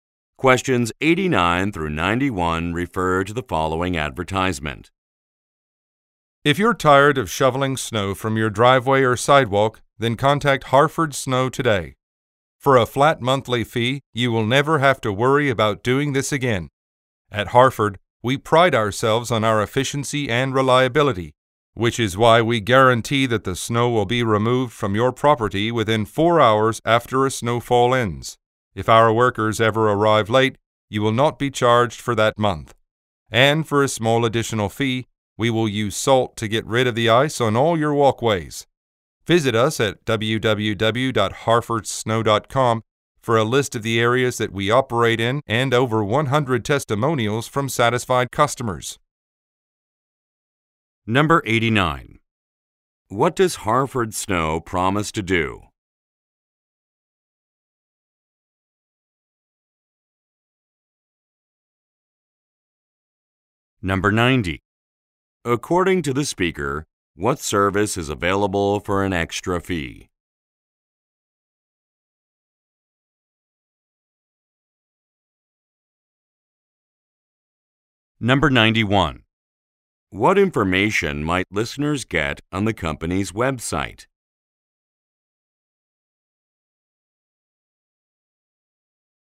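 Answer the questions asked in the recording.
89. Remove snow within 4 hours after a snowfall ends
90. Using salt to remove ice from walkways
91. A list of service areas and customer testimonials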